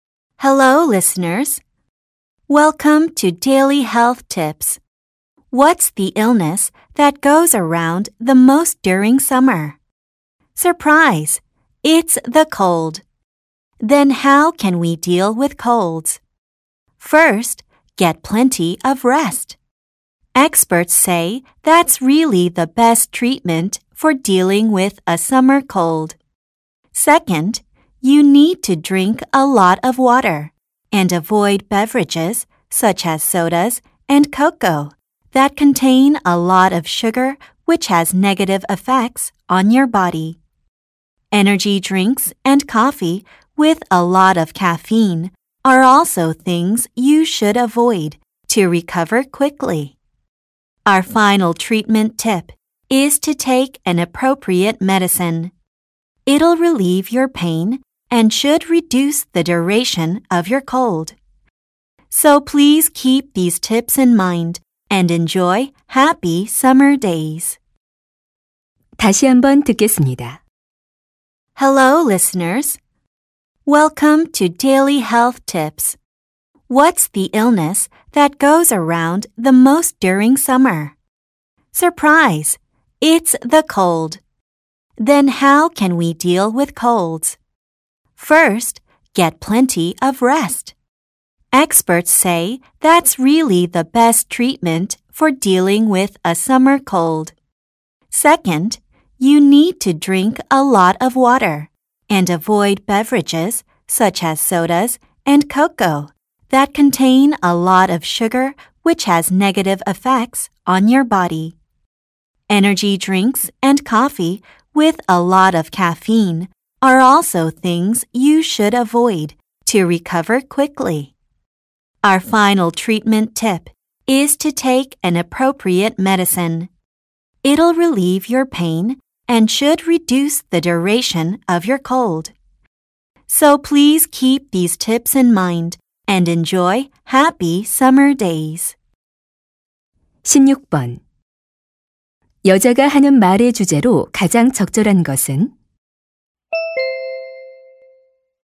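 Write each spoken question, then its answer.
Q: 여자가 하는 말의 주제로 가장 적절한 것은?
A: 여름 감기를 치료하는 방법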